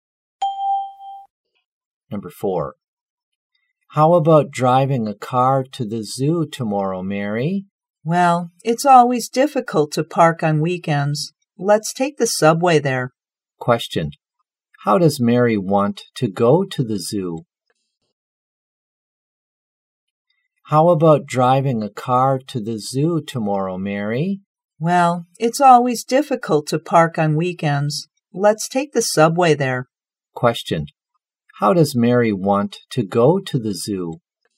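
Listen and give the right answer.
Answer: By subway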